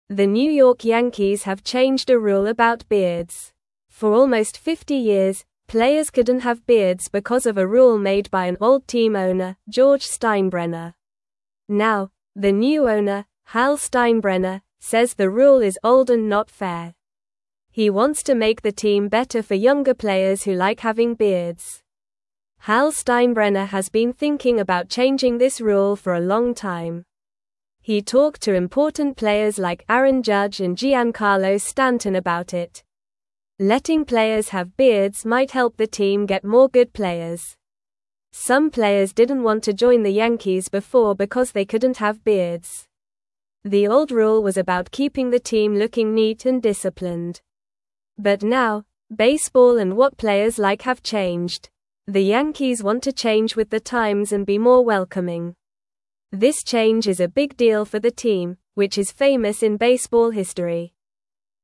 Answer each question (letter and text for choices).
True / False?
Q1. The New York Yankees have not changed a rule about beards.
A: False

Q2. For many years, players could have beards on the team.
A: False

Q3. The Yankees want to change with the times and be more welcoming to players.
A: True

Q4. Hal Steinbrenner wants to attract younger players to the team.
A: True

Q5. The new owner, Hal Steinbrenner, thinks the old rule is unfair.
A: True

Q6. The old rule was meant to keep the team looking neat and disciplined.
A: True

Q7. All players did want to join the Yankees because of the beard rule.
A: False

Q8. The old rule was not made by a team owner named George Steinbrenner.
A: False

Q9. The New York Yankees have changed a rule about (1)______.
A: beards

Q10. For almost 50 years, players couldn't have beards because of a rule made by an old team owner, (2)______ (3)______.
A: George

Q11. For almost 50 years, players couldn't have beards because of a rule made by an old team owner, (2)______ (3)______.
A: Steinbrenner

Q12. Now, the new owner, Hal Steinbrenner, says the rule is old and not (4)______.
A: fair

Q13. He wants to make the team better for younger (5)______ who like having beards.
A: players

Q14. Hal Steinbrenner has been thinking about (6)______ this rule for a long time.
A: changing

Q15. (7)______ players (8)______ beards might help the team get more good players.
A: Letting

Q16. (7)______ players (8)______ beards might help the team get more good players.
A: have

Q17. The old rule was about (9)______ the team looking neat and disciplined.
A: keeping

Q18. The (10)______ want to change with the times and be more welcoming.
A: Yankees

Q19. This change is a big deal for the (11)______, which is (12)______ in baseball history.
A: team

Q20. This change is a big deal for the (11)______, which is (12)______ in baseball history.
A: famous

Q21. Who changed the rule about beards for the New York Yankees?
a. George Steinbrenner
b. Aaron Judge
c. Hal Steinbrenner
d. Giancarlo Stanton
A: c. Hal Steinbrenner

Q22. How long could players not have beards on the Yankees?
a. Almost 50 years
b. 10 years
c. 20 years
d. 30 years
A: a. Almost 50 years

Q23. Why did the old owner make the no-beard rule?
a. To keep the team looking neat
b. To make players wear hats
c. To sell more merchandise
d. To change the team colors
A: a. To keep the team looking neat

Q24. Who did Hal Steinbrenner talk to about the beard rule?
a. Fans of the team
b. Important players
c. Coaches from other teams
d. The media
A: b. Important players

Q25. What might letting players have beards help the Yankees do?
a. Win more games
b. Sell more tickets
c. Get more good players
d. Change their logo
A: c. Get more good players

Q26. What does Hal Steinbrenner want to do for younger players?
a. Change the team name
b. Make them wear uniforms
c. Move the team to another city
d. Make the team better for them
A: d. Make the team better for them

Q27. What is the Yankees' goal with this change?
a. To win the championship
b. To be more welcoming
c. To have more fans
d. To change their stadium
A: b. To be more welcoming

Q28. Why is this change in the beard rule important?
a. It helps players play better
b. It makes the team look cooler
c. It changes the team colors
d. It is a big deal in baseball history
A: d. It is a big deal in baseball history

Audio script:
The New York Yankees have changed a rule about beards. For almost 50 years, players couldn't have beards because of a rule made by an old team owner, George Steinbrenner. Now, the new owner, Hal Steinbrenner, says the rule is old and not fair. He wants to make the team better for younger players who like having beards.
Hal Steinbrenner has been thinking about changing this rule for a long time. He talked to important players like Aaron Judge and Giancarlo Stanton about it. Letting players have beards might help the team get more good players. Some players didn't want to join the Yankees before because they couldn't have beards.
The old rule was about keeping the team looking neat and disciplined. But now, baseball and what players like have changed. The Yankees want to change with the times and be more welcoming. This change is a big deal for the team, which is famous in baseball history.

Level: Level 2